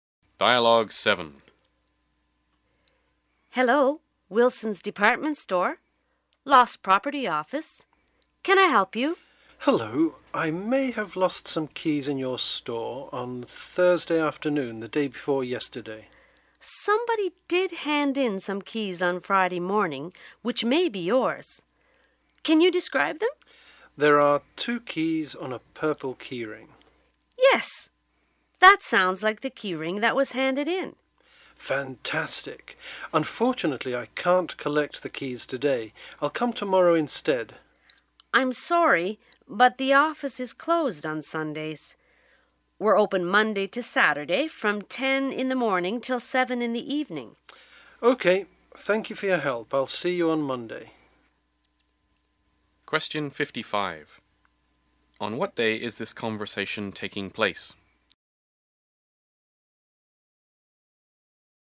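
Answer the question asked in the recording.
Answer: Saturday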